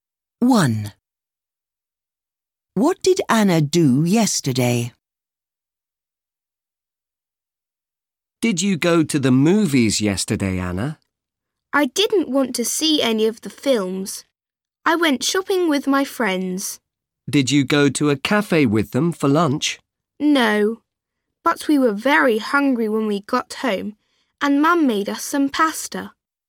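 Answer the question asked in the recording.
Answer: She went shopping with her friends.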